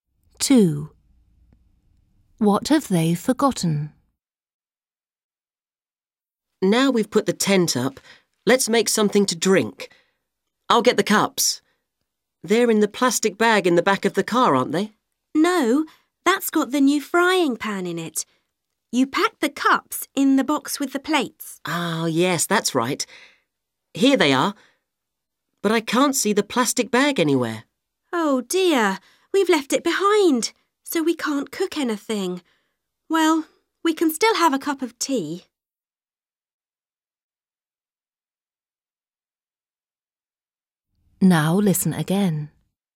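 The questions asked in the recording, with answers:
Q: What have they forgotten?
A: the plastic bag with the frying pan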